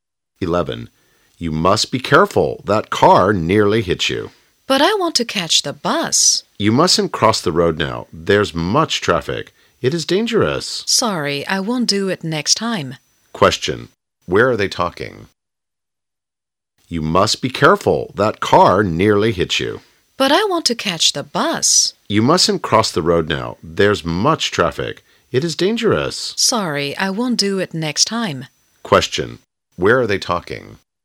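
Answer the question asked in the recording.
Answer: On the road (in the street)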